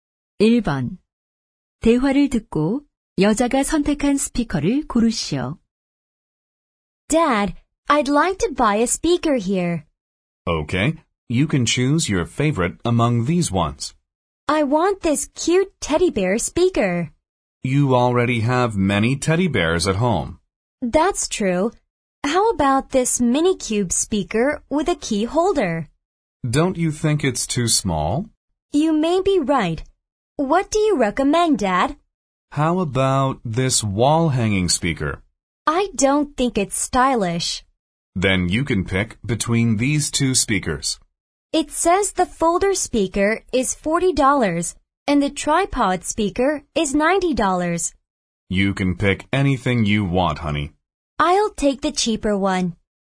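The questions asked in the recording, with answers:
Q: 대화를 듣고 여자가 선택한 스피커를 고르시오.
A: 폴더 스피커 ($40)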